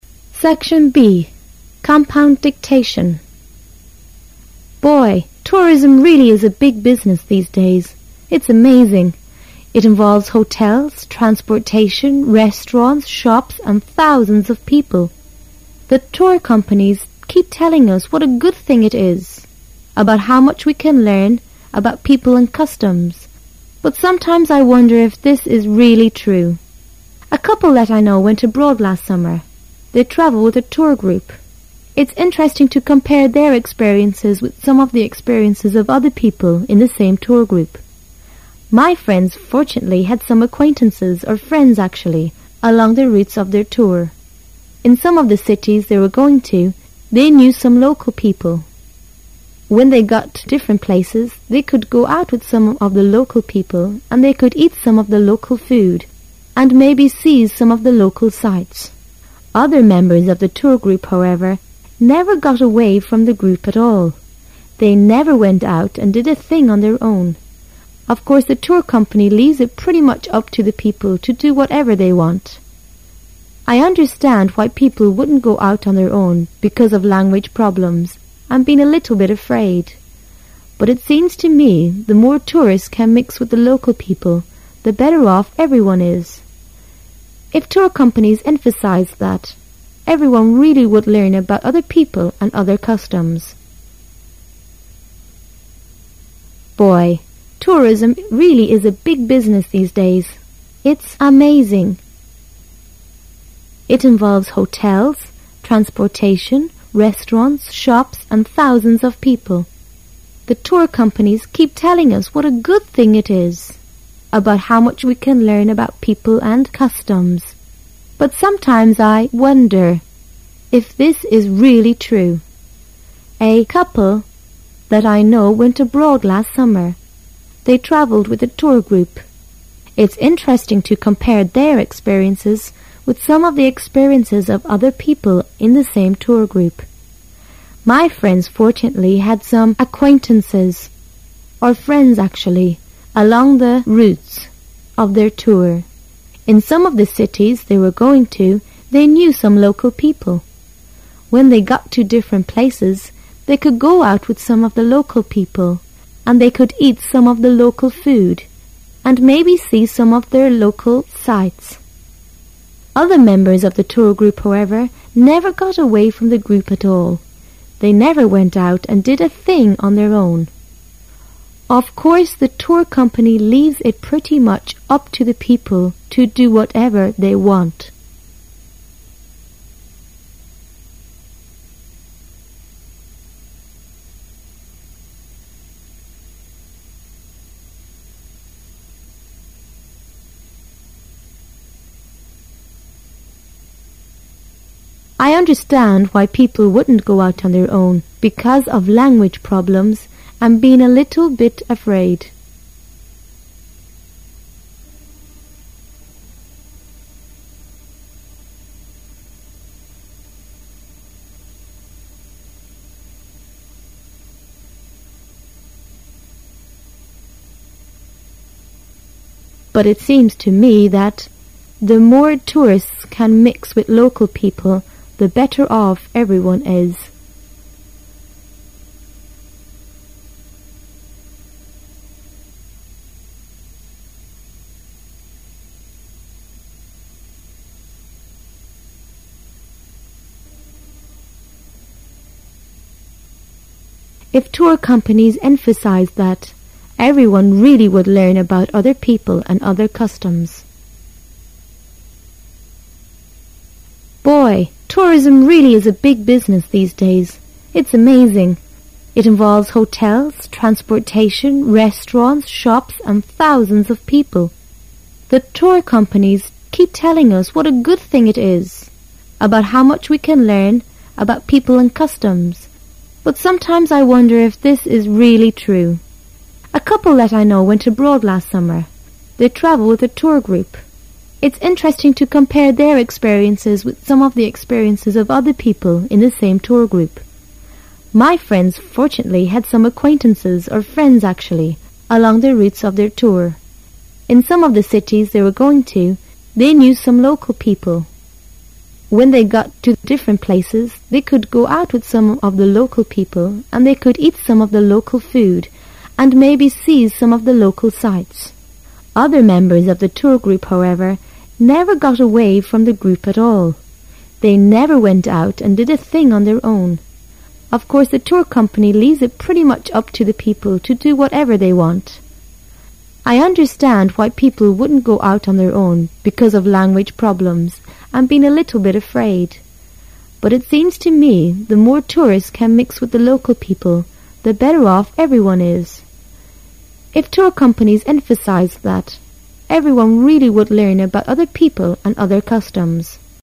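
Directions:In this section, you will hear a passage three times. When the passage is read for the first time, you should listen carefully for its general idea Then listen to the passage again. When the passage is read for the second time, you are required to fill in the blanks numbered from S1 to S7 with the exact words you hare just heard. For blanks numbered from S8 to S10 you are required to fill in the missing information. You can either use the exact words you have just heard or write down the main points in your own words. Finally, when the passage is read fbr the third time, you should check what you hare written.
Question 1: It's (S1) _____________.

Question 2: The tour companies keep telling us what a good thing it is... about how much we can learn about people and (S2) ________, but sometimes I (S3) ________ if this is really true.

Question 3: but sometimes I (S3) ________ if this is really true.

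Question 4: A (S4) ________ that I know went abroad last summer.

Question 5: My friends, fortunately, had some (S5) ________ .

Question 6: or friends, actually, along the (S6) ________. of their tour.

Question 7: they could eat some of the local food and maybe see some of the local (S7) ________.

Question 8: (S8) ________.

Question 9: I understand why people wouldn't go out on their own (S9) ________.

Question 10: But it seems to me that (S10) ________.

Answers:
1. amazing
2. customs
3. wonder
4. couple
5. acquaintances
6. routes
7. sights
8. Of course, the tour company leaves it pretty much up to the people to do whatever they want
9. because of language problems and being a little bit afraid
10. the more tourists can mix with the local people, the better off everyone is

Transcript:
[解析] Boy, tourism really is a big business these days. It's (S1) amazing. It involves hotels, transportation, restaurants, shops, and thousands of people. 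The tour companies keep telling us what a good thing it is... about how much we can learn about people and (S2) customs, but sometimes I (S3) wonder if this is really true. A (S4) couple that I know went abroad last summer. It's interesting to com pare their experiences with some of the experiences of other people in the same tour group. My friends, fortunately, had some (S5) acquaintances, or friends, actually, along the (S6) routes of their tour. In some of the cities they were going to, they knew some local people. When they got to different places, they could go out with some of the local people and they could eat some of the local food and maybe see some of the local (S7) sights. Other members of the tour group, however, never got away from the group at all. They never went out and did a thing on their own. (S8) Of course the tour company leaves it pretty much up to the people to do whatever they want. 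I understand why people wouldn't go out on their own (S9) because of language problems and being a little bit afraid. But it seems to me that (S10) the more tourists can mix with local people, the better off everyone is. If tour companies emphasized that, everyone really would learn about other people and other customs.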